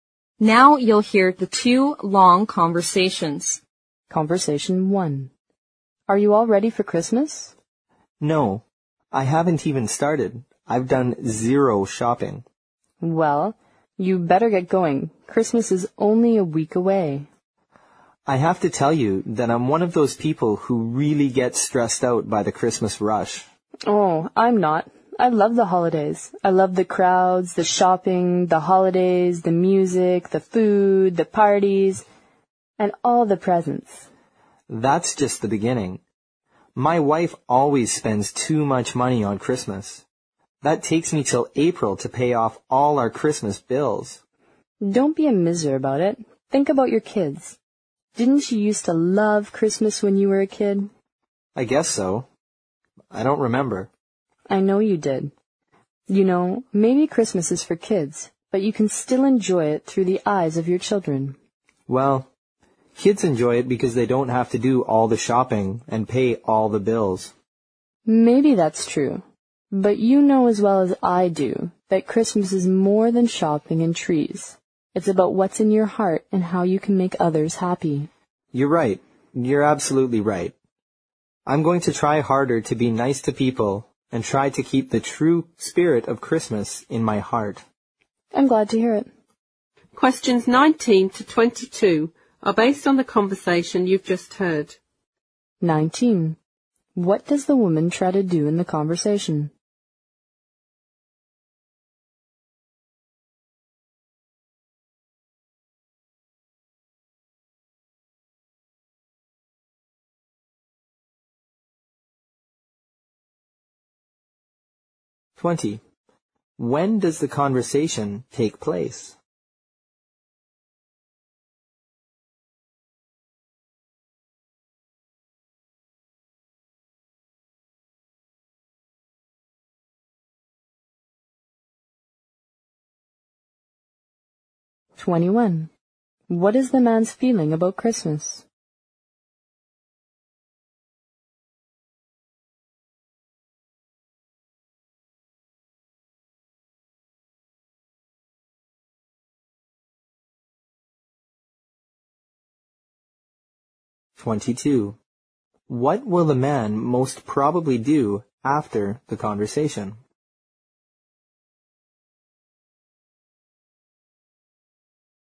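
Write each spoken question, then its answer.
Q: When does the conversation take place?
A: About a week before Christmas

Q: What is the man's feeling about Christmas?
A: He gets stressed out by it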